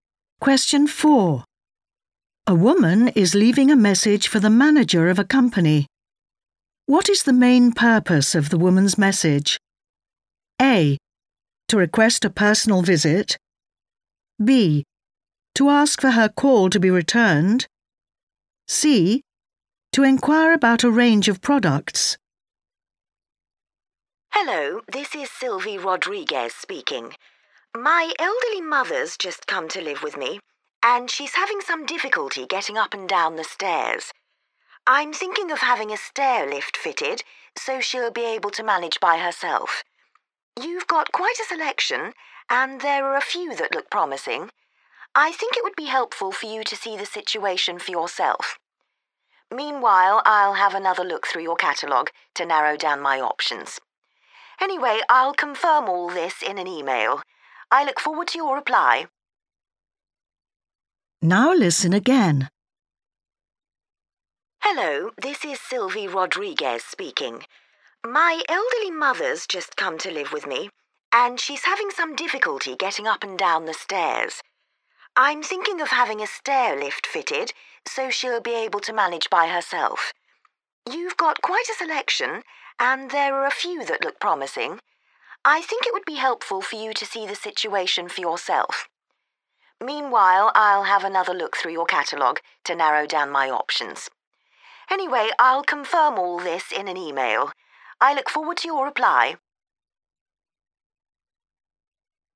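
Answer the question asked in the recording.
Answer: A: To request a personal visit.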